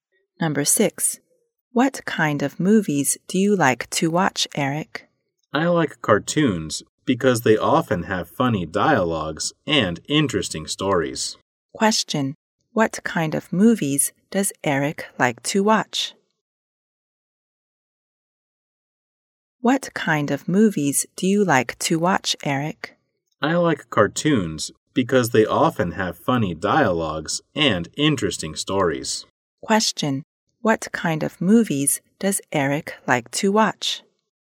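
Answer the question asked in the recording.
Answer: Cartoons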